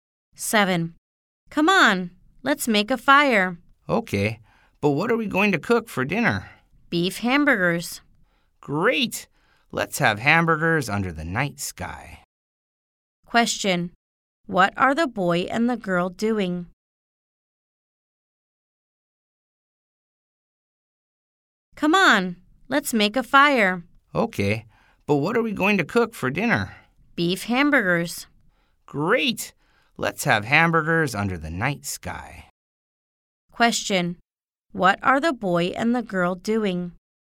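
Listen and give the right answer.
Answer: Making a fire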